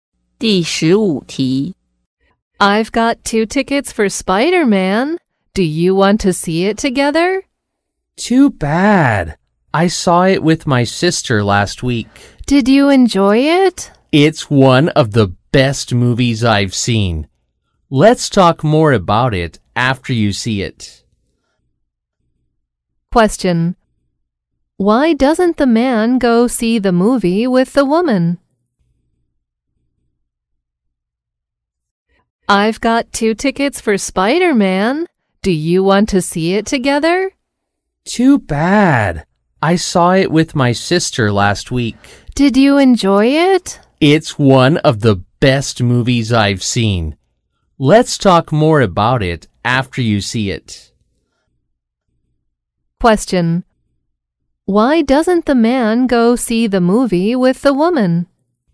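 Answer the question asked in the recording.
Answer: He already saw it with his sister last week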